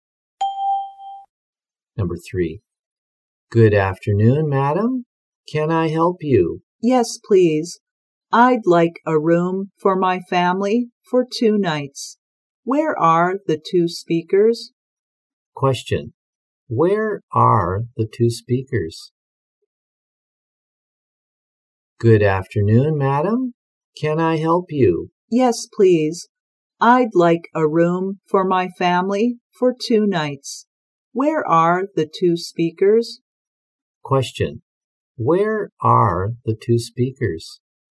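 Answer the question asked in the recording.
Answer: In a hotel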